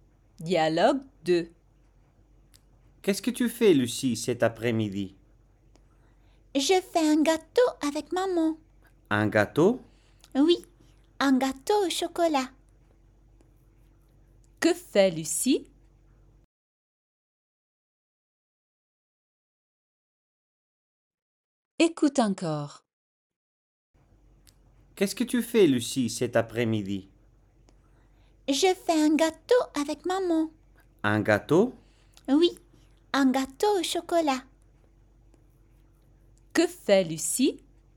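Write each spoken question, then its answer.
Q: Que fait Lucie?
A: Un gâteau au chocolat avec maman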